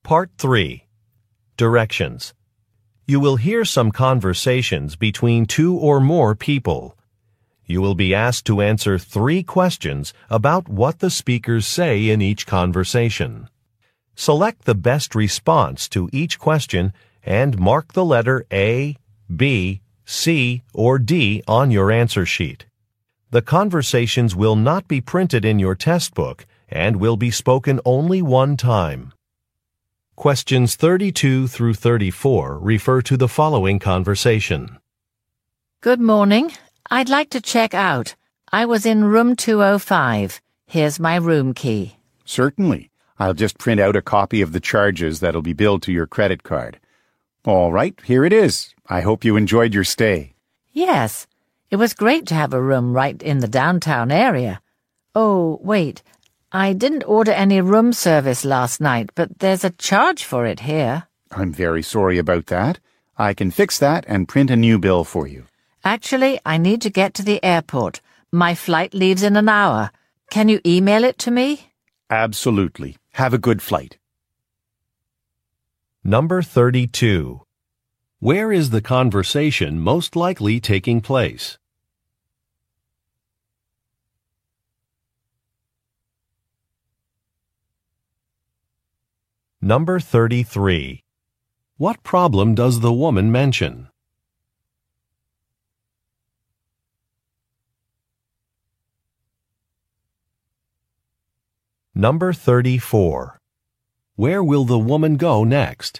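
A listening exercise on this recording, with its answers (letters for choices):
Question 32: Where is the conversation most likely taking place?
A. At a supermarket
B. At a hotel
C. At an auto shop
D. At a travel agency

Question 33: What problem does the woman mention?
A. A bill is not correct.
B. A repair is not finished.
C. A reservation was not available.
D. A staff member was not polite.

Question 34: Where will the woman go next?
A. To a client's office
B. To the airport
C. To a shopping center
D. To a museum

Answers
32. B
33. A
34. B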